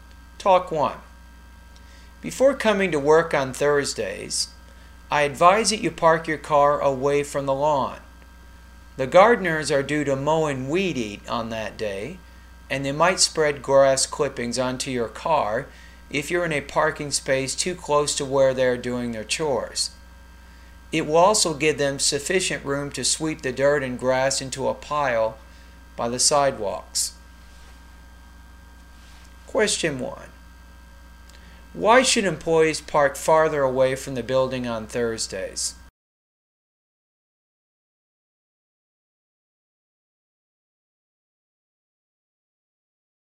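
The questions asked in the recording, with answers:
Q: Why should employees park farther away from the building on Thursdays?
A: The gardeners mow and weed eat on Thursdays and might spread grass clippings onto cars parked too close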